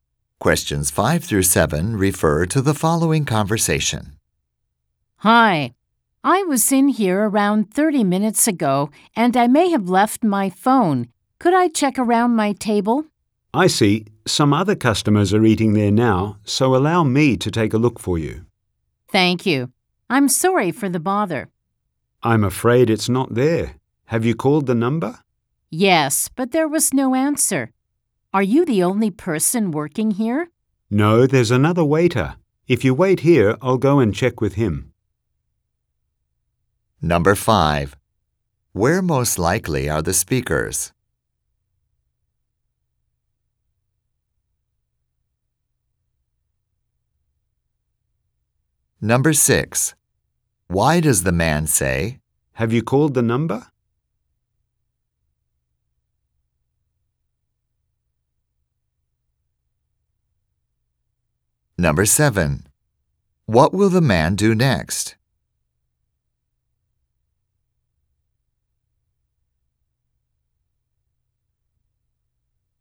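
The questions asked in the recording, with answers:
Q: Where most likely are the speakers?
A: In a restaurant

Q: What will the man do next?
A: Check with another waiter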